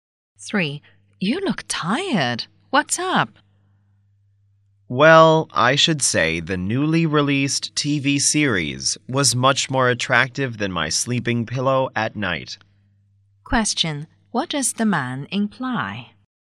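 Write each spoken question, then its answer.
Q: What does the man imply?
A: He stayed up late watching the new TV series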